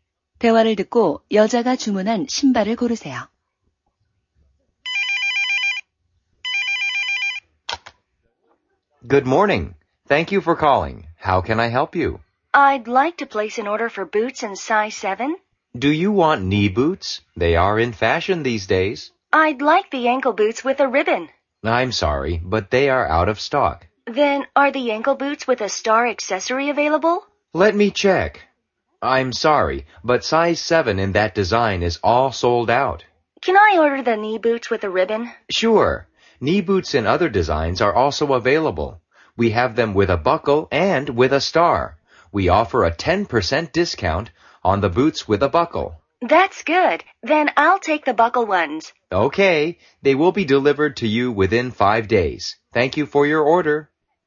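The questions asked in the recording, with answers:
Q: 대화를 듣고 여자가 주문한 신발을 고르세요.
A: 버클이 달린 무릎 부츠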